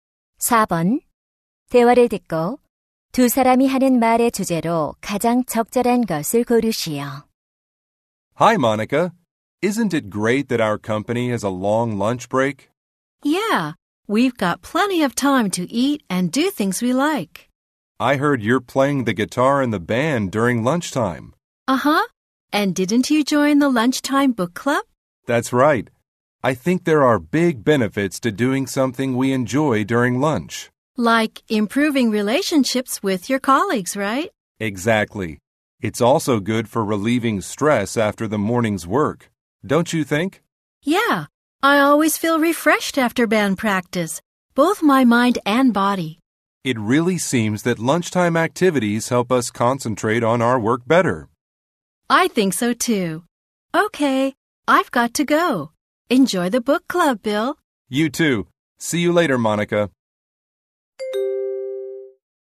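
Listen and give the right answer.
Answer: 점심시간 활동의 이점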